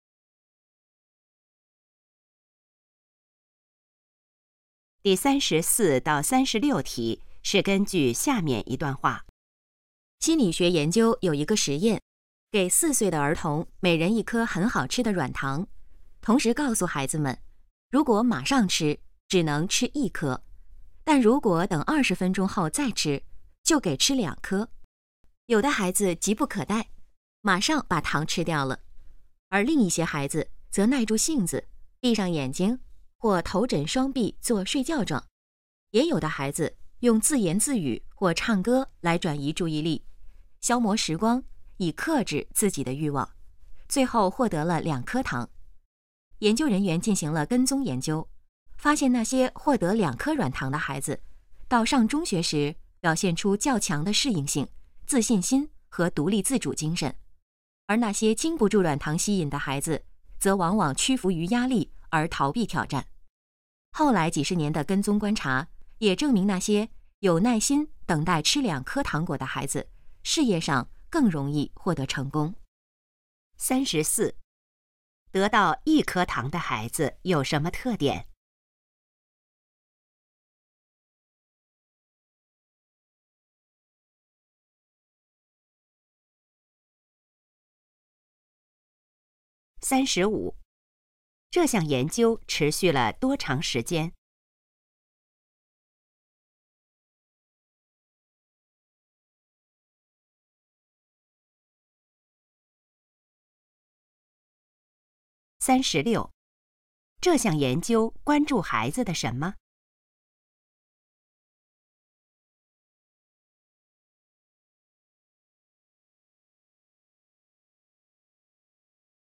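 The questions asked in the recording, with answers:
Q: 得到一颗糖的孩子有什么特点?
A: 往往屈服于压力而逃避挑战

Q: 这项研究持续了多长时间?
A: 几十年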